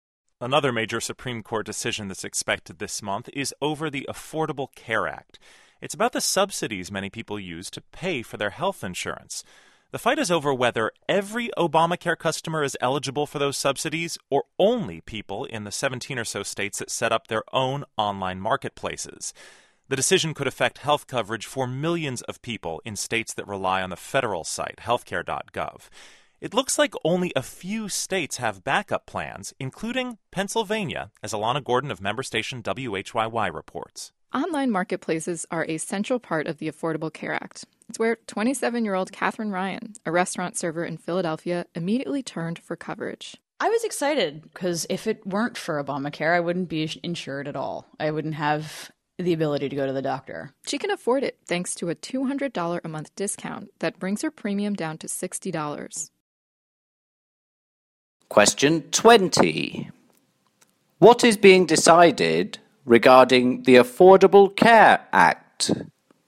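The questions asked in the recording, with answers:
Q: What is being decided regarding the Affordable Care Act?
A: Whether all customers, or only those in states with their own marketplaces, get subsidies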